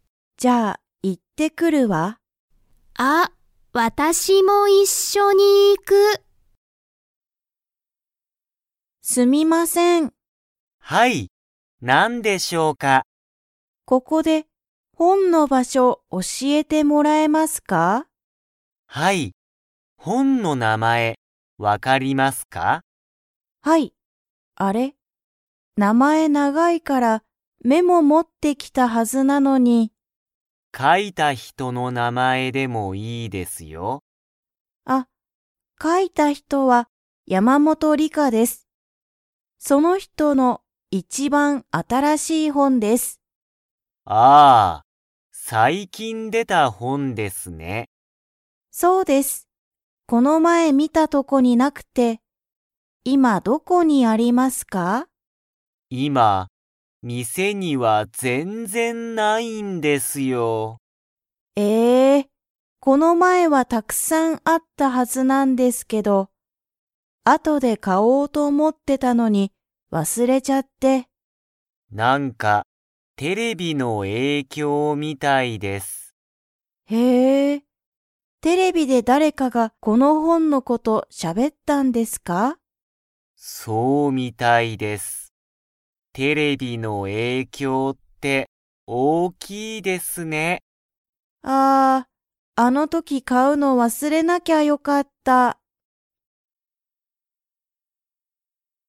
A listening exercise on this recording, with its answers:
Comprehension Quiz (Skip if you don't understand the conversation yet)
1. ジュンは____を教(おし)えてもらいたい。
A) 本(ほん)の名前(なまえ)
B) 本(ほん)の場所(ばしょ)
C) 店(みせ)の名前なまえ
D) 店(みせ)の場所ばしょ)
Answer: B) 本(ほん)の場所(ばしょ)

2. ジュンは本(ほん)を買(か)えましたか?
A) はい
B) いいえ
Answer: B) いいえ

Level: Level 2

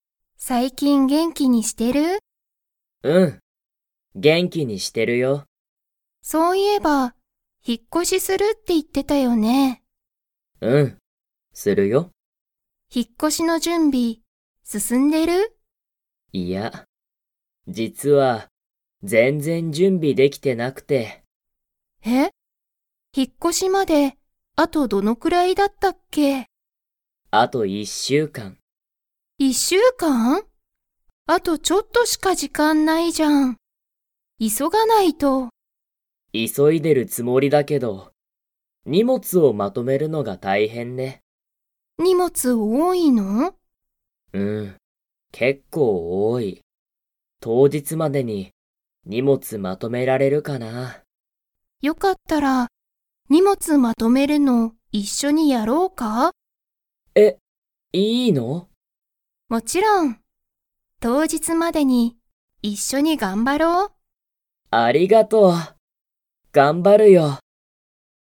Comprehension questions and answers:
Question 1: タクヤは、引ひっ越こしの準備じゅんびが進すすんでいますか?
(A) はい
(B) いいえ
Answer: (B) いいえ

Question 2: タクヤは、 をまとめるのが大変たいへんだ。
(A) 元気げんき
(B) 当日とうじつ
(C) 荷物にもつ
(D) 準備じゅんび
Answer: (C) 荷物にもつ

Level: Level 4

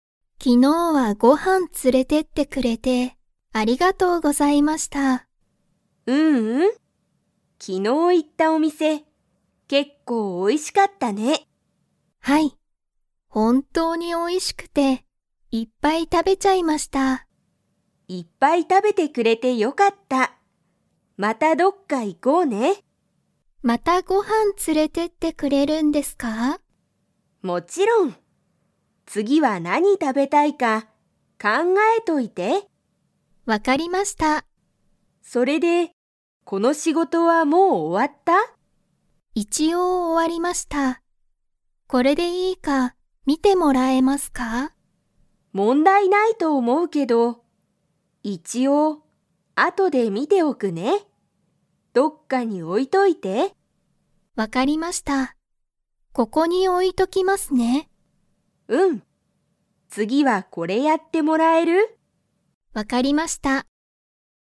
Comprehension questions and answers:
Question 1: 昨日行きのういったお店みせは、____。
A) 結構美味けっこうおいしかった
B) あまりうまくなかった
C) もう終おわった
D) 問題もんだいがあった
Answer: A) 結構美味けっこうおいしかった

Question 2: 松井まついさんは、またご飯はんに連つれてってくれますか?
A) はい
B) いいえ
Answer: A) はい

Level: Level 2

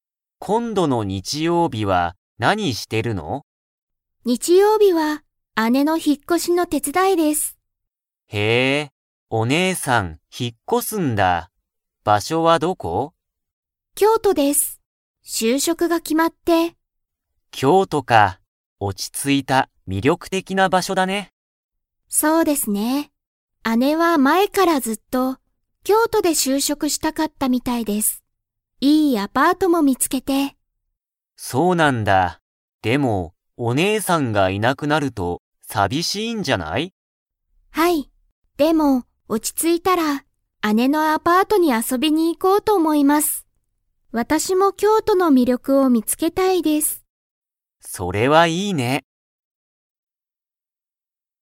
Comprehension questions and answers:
Comprehension Quiz (Skip if you don't understand the conversation yet)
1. 日曜日にちようび、誰だれが引ひっ越こしますか?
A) サカイさん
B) オオタさん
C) サカイさんの兄あに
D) オオタさんの姉あね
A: D) オオタさんの姉あね

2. オオタさんは、姉あねがいなくなると 。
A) 寂さびしい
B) 寂さびしくない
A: A) 寂さびしい

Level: Level 4

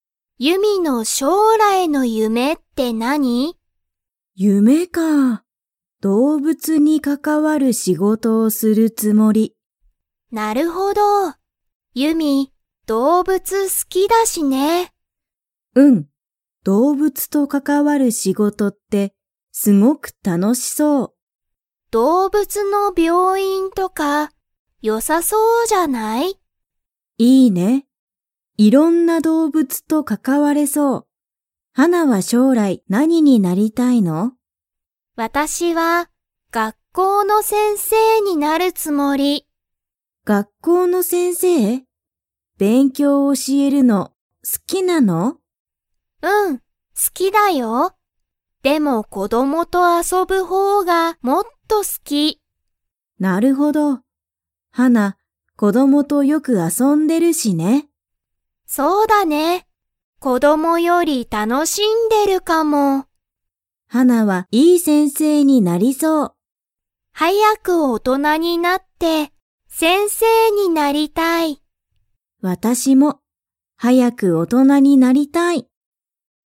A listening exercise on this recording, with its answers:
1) ユミは、何なにが好すきですか?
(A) 夢ゆめ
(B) 子こども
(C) 動物どうぶつ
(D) 病院びょういん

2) 二人ふたりは、早はやく大人おとなに 。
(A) なりたい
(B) なりたくない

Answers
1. (C) 動物どうぶつ
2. (A) なりたい

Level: Level 3

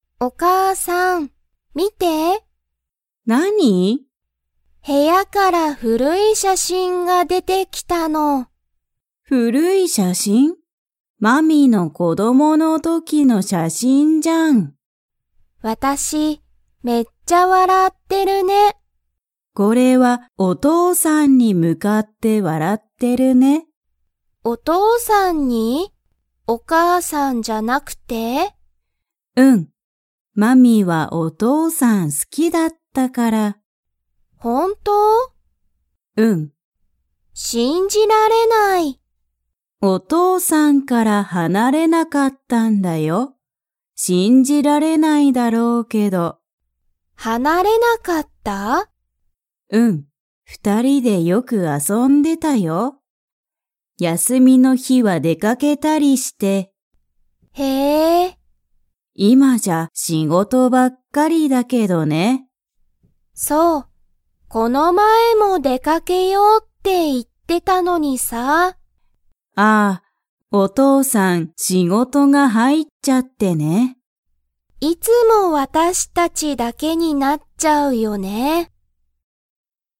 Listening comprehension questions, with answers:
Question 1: 子供こどもの時とき、マミは誰だれが好すきでしたか?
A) お母かあさん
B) お兄にいさん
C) お姉ねえさん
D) お父とうさん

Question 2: マミとお母かあさんは、この前まえお父とうさんと 。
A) 出でかけた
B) 出でかけなかった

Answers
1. D) お父とうさん
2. B) 出でかけなかった

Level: Level 3

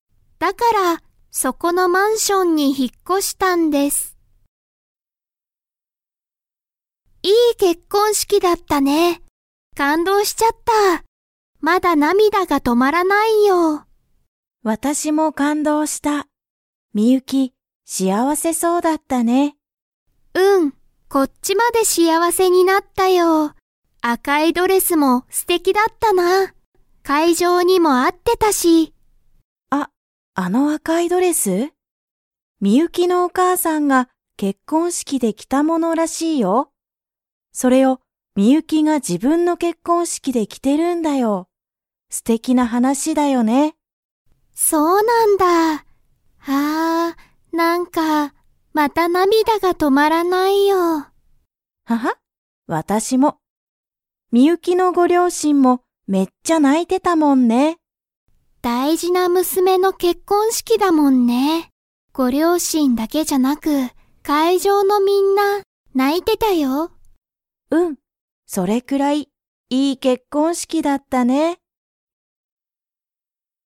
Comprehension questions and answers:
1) ミユキさんは、誰だれのドレスを着きましたか?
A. サヤカ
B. アヤ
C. ミユキのお母かあさん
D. ミユキのお姉ねえさん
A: C. ミユキのお母かあさん

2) 結婚式けっこんしきでは、会場かいじょうのみんなが 。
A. 泣ないた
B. 泣なかなかった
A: A. 泣ないた

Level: Level 4

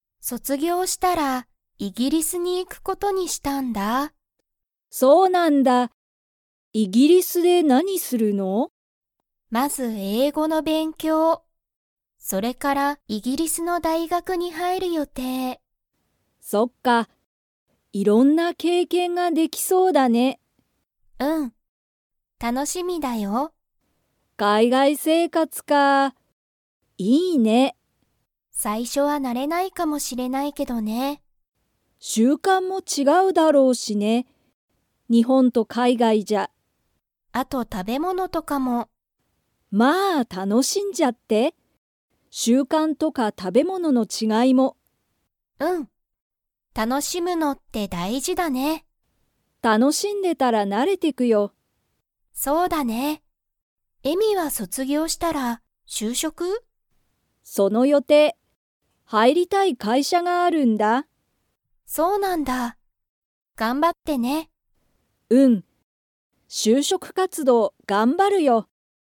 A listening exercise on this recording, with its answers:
Comprehension Quiz (Skip if you don't understand the conversation yet)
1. あきは、イギリスでまず 。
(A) 英語えいごの勉強べんきょうをする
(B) 大学だいがくに入はいる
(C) 食たべ物ものを食たべる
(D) 習慣しゅうかんに慣なれる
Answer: (A) 英語えいごの勉強べんきょうをする

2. えみも、卒業そつぎょうしたらイギリスに行いきますか?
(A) はい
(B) いいえ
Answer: (B) いいえ

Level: Level 4

